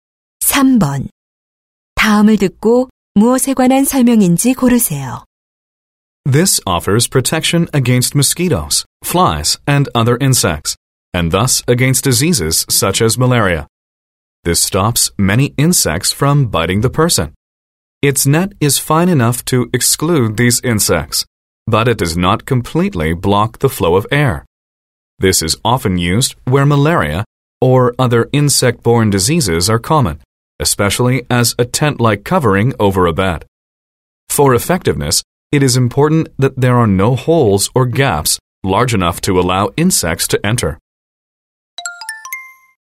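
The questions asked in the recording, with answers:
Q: 다음을 듣고 무엇에 관한 설명인지 고르세요.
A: 모기장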